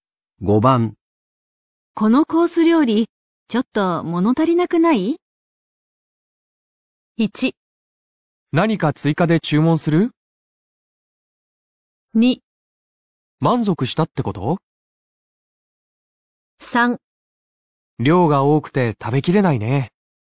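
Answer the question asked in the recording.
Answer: 1: 何か追加で注文する?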